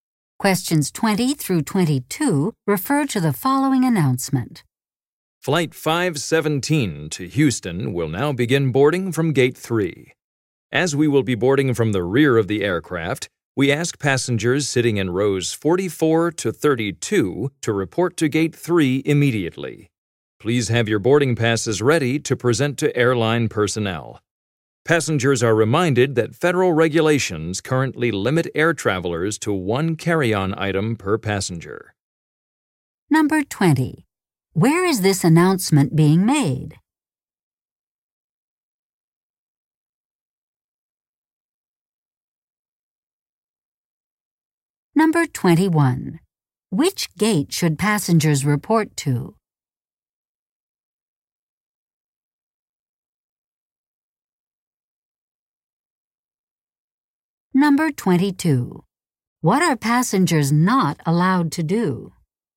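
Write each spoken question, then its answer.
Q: Where is this announcement being made?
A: At an airport

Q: Which gate should passengers report to?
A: Gate 3

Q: What are passengers not allowed to do?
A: Bring more than one carry-on item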